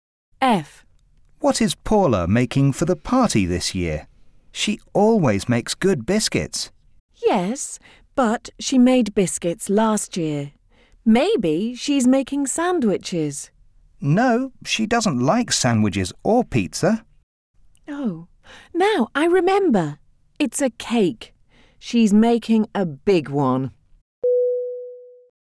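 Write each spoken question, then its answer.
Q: What is Paula making for the party this year?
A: A cake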